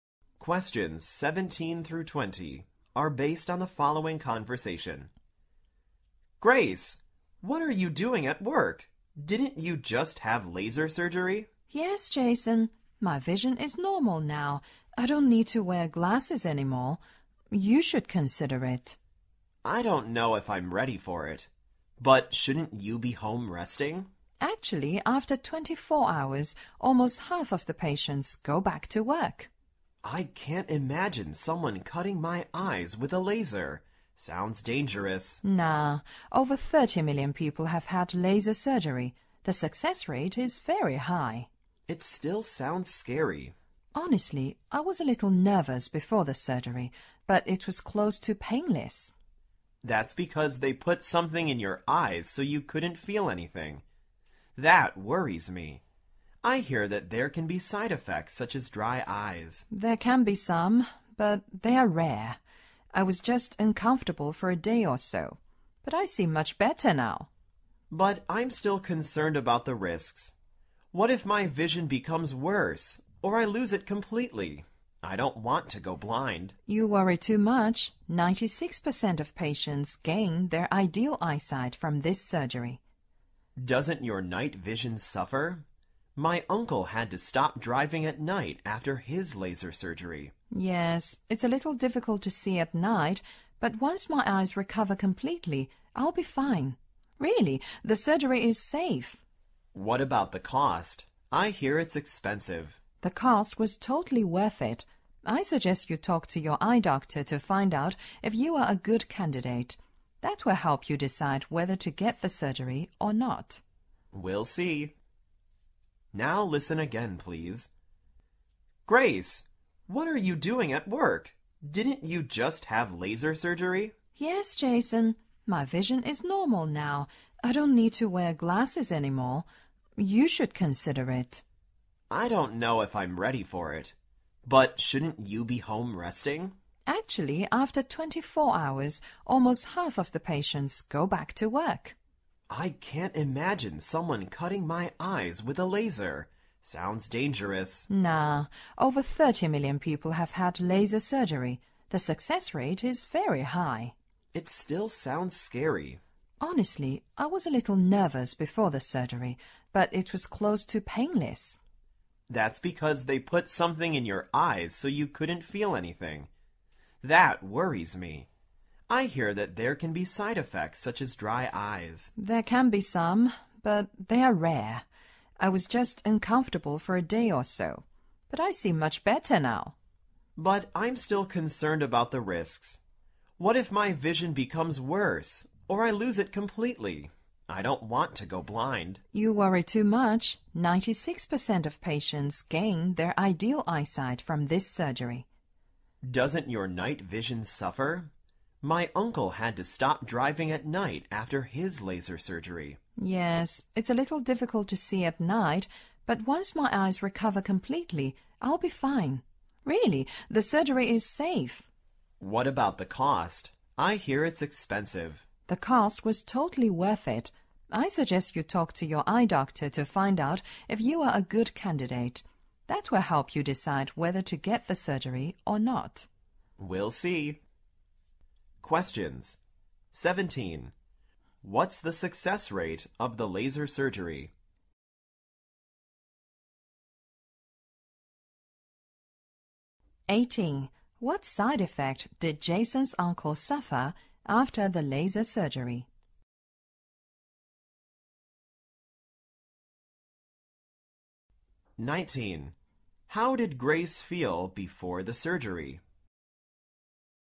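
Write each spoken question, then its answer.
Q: What side effect did Jason's uncle suffer after the laser surgery?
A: His night vision got worse, so he had to stop driving at night

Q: How did Grace feel before the surgery?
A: A little nervous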